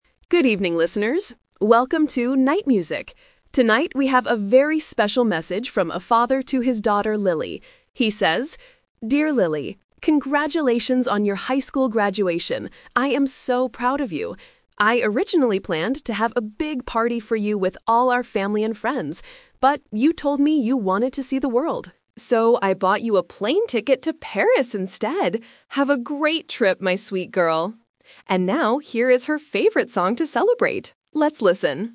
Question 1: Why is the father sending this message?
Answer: Because Lily graduated from high school.

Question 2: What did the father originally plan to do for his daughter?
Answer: Have a big party.

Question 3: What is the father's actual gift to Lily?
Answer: A trip to Paris.

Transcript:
Radio DJ: Good evening, listeners! Welcome to 'Night Music'. Tonight, we have a very special message from a father to his daughter, Lily. He says: 'Dear Lily, congratulations on your high school graduation! I am so proud of you. I originally planned to have a big party for you with all our family and friends. But, you told me you wanted to see the world. So, I bought you a plane ticket to Paris instead! Have a great trip, my sweet girl.' And now, here is her favorite song to celebrate. Let's listen!